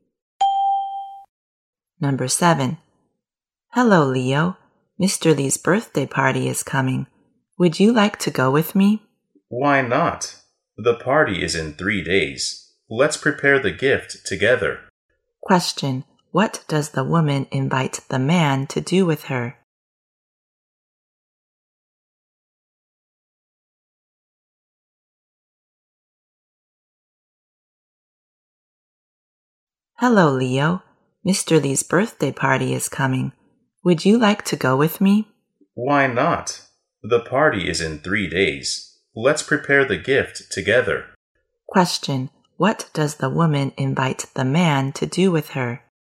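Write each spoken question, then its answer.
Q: What does the woman invite the man to do with her?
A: Go to Mr. Lee's birthday party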